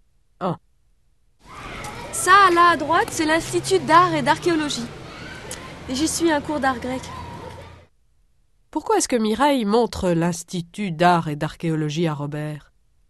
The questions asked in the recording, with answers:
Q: Pourquoi est-ce que Mireille montre l'Institut d'art et d'archéologie à Robert?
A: Parce qu'elle y suit un cours d'art grec.